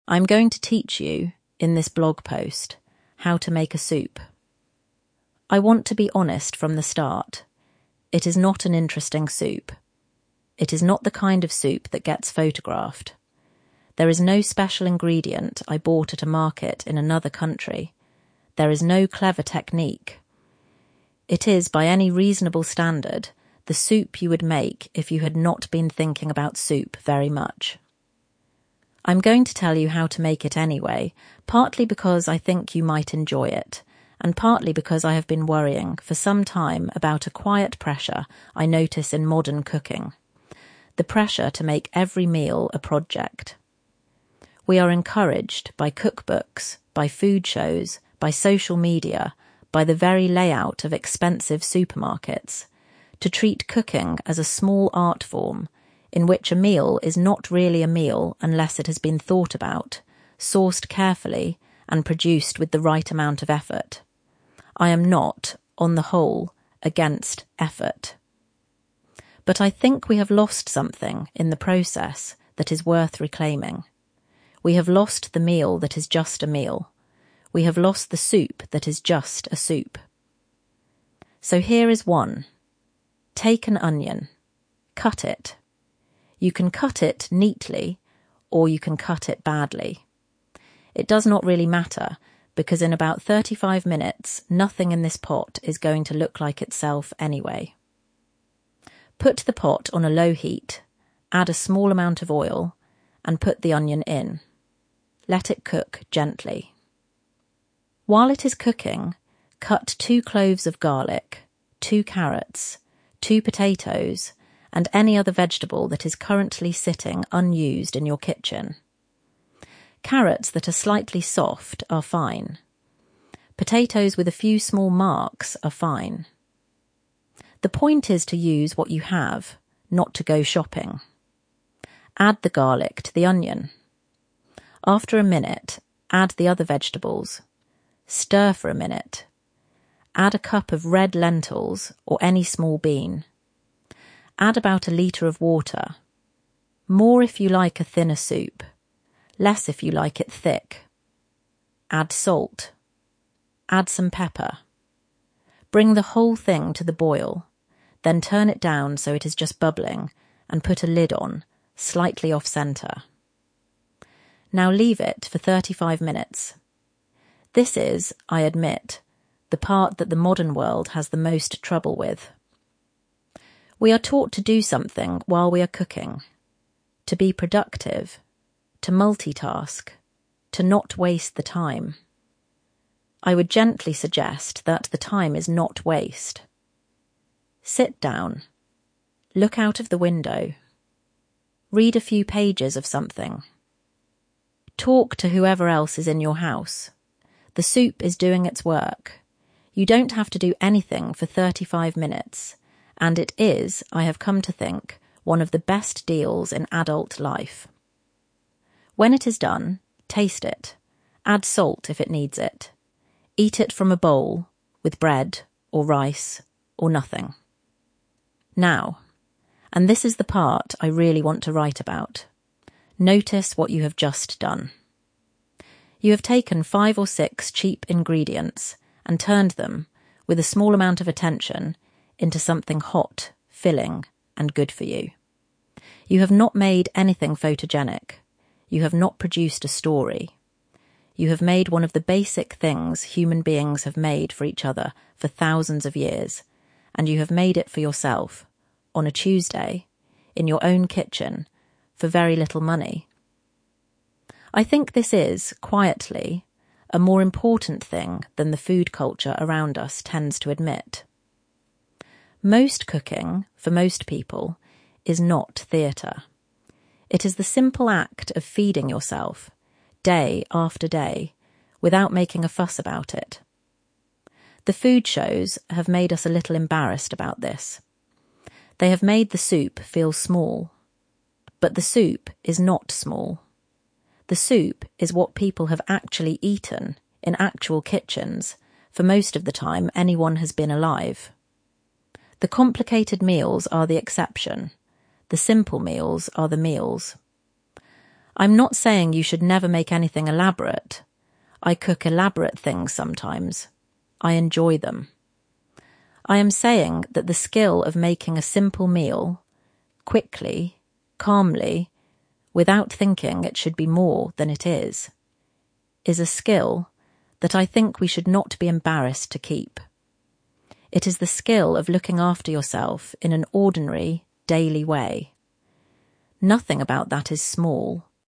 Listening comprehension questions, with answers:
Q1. What 'quiet pressure' is the writer worried about in modern cooking?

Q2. What does the writer say we have lost?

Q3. What can you use in the soup, even if it isn't perfect?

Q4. What is the part of cooking the modern world has trouble with, according to the writer?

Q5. What does the writer say is 'one of the best deals in adult life'?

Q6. What does the writer say the food shows have done?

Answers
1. The pressure to make every meal a 'project'
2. 'The meal that is just a meal. The soup that is just a soup.'
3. Carrots that are slightly soft, potatoes with a few small marks.
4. Leaving the soup alone for thirty-five minutes
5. Having thirty-five minutes when 'you don't have to do anything'
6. Made us 'a little embarrassed' about simple cooking.

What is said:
I am going to teach you, in this blog post, how to make a soup. I want to be honest from the start: it is not an interesting soup. It is not the kind of soup that gets photographed. There is no special ingredient I bought at a market in another country. There is no clever technique. It is, by any reasonable standard, the soup you would make if you had not been thinking about soup very much.
I am going to tell you how to make it anyway, partly because I think you might enjoy it, and partly because I have been worrying for some time about a quiet pressure I notice in modern cooking — the pressure to make every meal a project. We are encouraged, by cookbooks, by food shows, by social media, by the very layout of expensive supermarkets, to treat cooking as a small art form, in which a meal is not really a meal unless it has been thought about, sourced carefully, and produced with the right amount of effort. I am not, on the whole, against effort. But I think we have lost something, in the process, that is worth reclaiming. We have lost the meal that is just a meal. We have lost the soup that is just a soup.
So here is one.
Take an onion. Cut it. You can cut it neatly, or you can cut it badly; it does not really matter, because in about thirty-five minutes nothing in this pot is going to look like itself anyway. Put the pot on a low heat, add a small amount of oil, and put the onion in. Let it cook gently. While it is cooking, cut two cloves of garlic, two carrots, two potatoes, and any other vegetable that is currently sitting unused in your kitchen. Carrots that are slightly soft are fine. Potatoes with a few small marks are fine. The point is to use what you have, not to go shopping.
Add the garlic to the onion. After a minute, add the other vegetables. Stir for a minute. Add a cup of red lentils, or any small bean. Add about a litre of water — more if you like a thinner soup, less if you like it thick. Add salt. Add some pepper. Bring the whole thing to the boil, then turn it down so it is just bubbling, and put a lid on, slightly off-centre.
Now leave it for thirty-five minutes.
This is, I admit, the part that the modern world has the most trouble with. We are taught to do something while we are cooking — to be productive, to multitask, to not waste the time. I would gently suggest that the time is not waste. Sit down. Look out of the window. Read a few pages of something. Talk to whoever else is in your house. The soup is doing its work. You don't have to do anything for thirty-five minutes, and it is, I have come to think, one of the best deals in adult life.
When it is done, taste it. Add salt if it needs it. Eat it from a bowl, with bread, or rice, or nothing.
Now — and this is the part I really want to write about — notice what you have just done. You have taken five or six cheap ingredients and turned them, with a small amount of attention, into something hot, filling, and good for you. You have not made anything photogenic. You have not produced a story. You have made one of the basic things human beings have made for each other for thousands of years, and you have made it for yourself, on a Tuesday, in your own kitchen, for very little money.
I think this is, quietly, a more important thing than the food culture around us tends to admit. Most cooking, for most people, is not theatre. It is the simple act of feeding yourself, day after day, without making a fuss about it. The food shows have made us a little embarrassed about this. They have made the soup feel small. But the soup is not small. The soup is what people have actually eaten, in actual kitchens, for most of the time anyone has been alive. The complicated meals are the exception. The simple meals are the meals.
I am not saying you should never make anything elaborate. I cook elaborate things sometimes; I enjoy them. I am saying that the skill of making a simple meal — quickly, calmly, without thinking it should be more than it is — is a skill that I think we should not be embarrassed to keep. It is the skill of looking after yourself in an ordinary, daily way. Nothing about that is small.